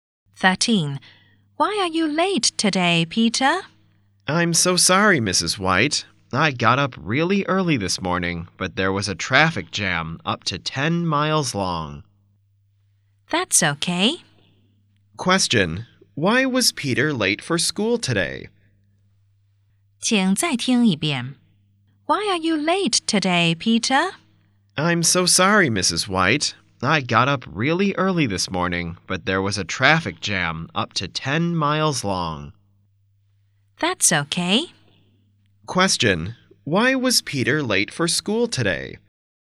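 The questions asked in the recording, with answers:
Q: Why was Peter late for school today?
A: There was a traffic jam.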